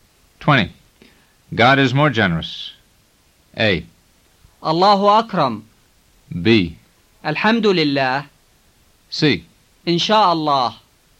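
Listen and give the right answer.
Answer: A: الله أكرم.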